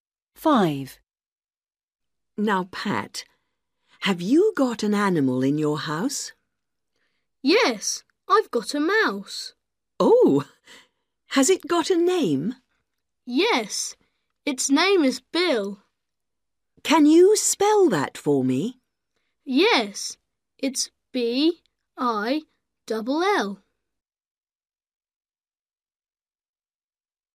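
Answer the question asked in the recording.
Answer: Bill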